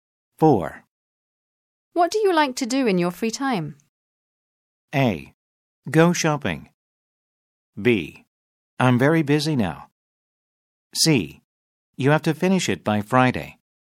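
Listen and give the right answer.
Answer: A: Go shopping.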